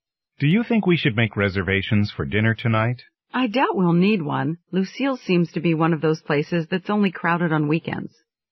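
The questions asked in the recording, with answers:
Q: What does the woman mean?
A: They probably won't need a reservation because the restaurant is only crowded on weekends.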